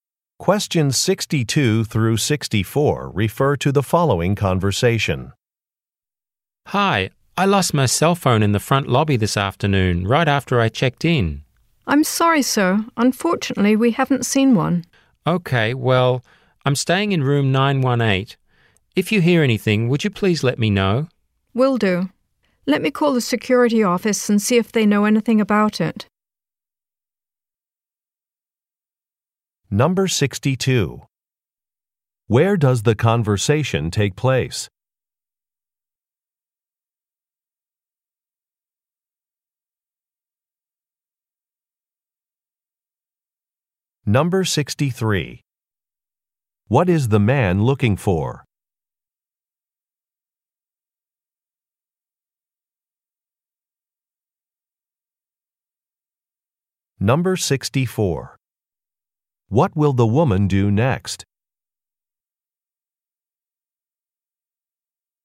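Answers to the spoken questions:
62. At a hotel
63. His cell phone
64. Call the security office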